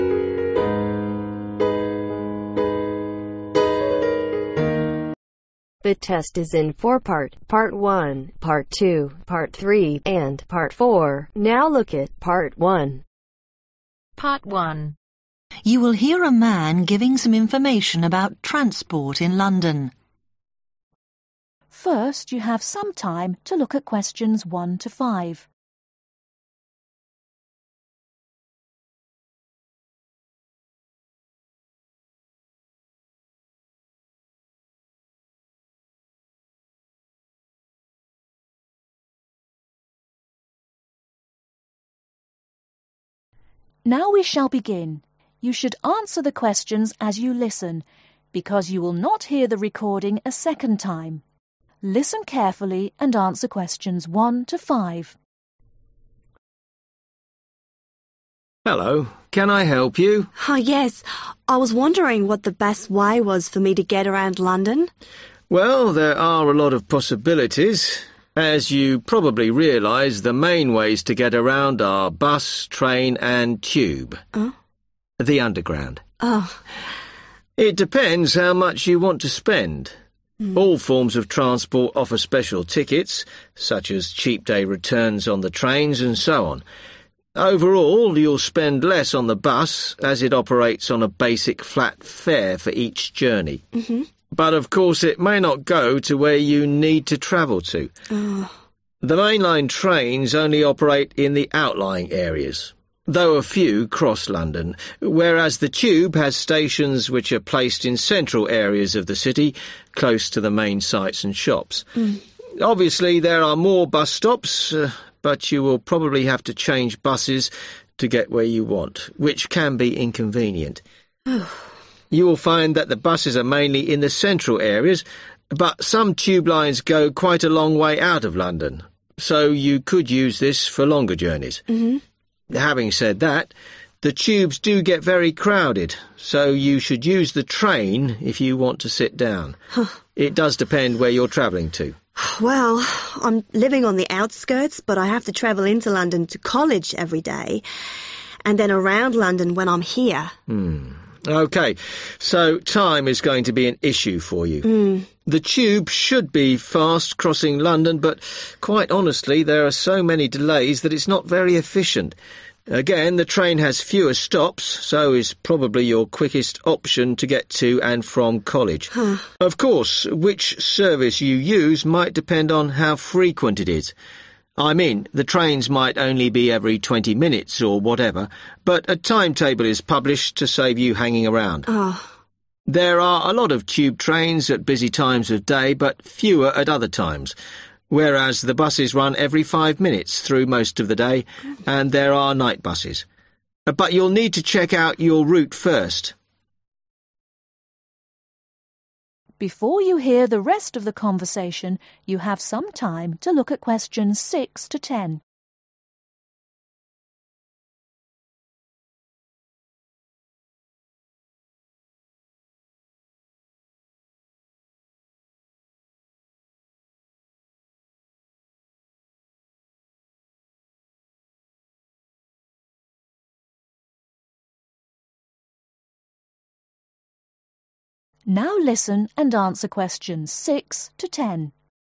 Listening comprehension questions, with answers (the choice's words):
Write the correct letter A, B or C next to Questions 1-5.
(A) tube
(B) train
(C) bus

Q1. cheapest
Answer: bus

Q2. most convenient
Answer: tube

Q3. most comfortable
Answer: train

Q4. fastest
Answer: train

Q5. most frequent service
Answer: bus